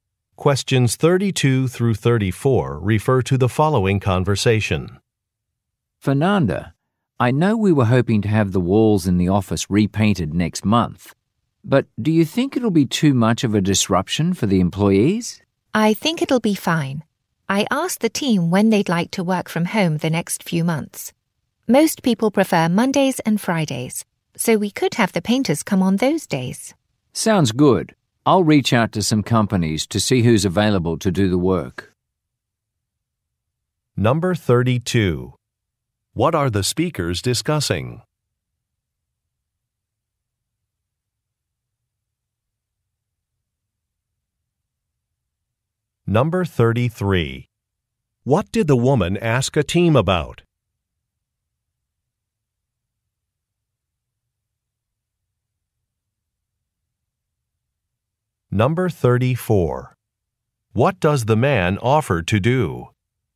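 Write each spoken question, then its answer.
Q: What are the speakers discussing?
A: Having the office walls repainted

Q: What did the woman ask a team about?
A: Which days they'd like to work from home

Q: What does the man offer to do?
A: Contact painting companies to see who is available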